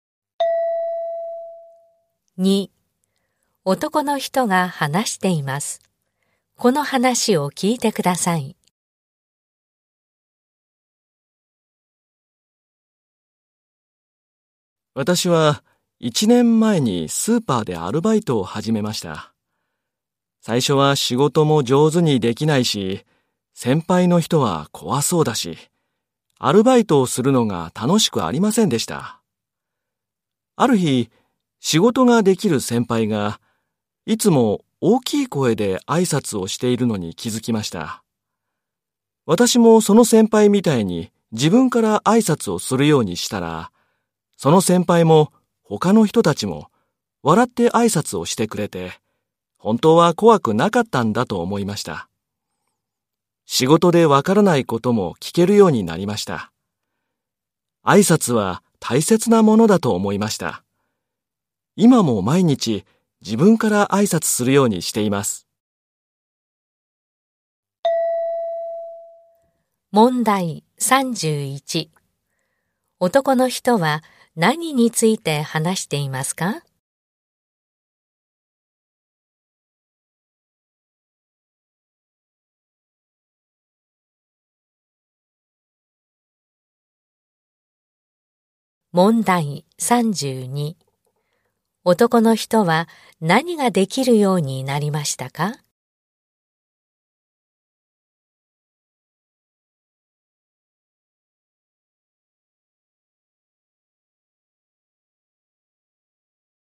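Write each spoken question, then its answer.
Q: 男の人は何について話していますか?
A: 挨拶の大切さ

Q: 男の人は何ができるようになりましたか?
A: 仕事でわからないことを聞けるようになった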